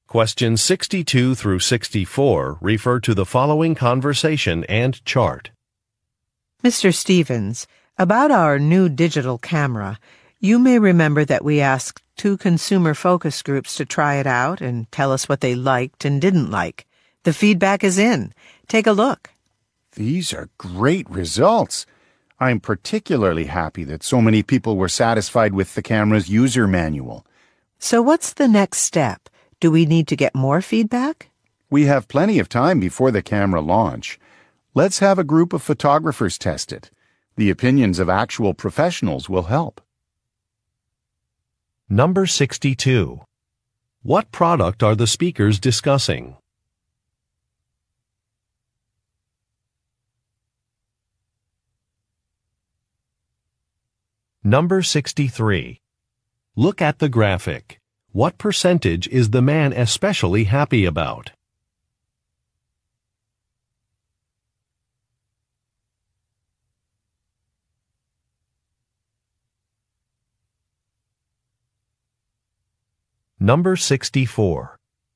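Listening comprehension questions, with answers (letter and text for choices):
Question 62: What product are the speakers discussing?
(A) A laptop computer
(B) A digital camera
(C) A mobile phone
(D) A video game system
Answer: (B) A digital camera

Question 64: What does the man suggest?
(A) Asking professionals for their opinions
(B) Switching to a new battery vendor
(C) Changing the product's launch date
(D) Redesigning a carrying case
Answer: (A) Asking professionals for their opinions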